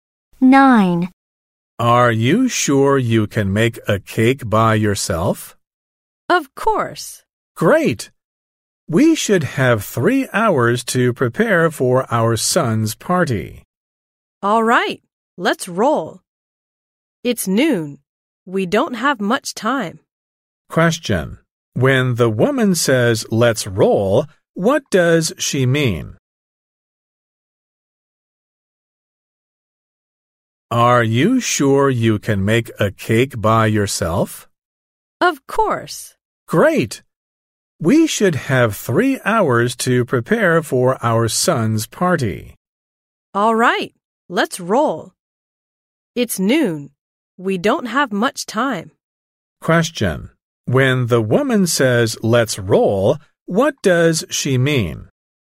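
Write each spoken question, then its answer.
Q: When the woman says, let's roll, what does she mean?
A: Let's get started (they don't have much time).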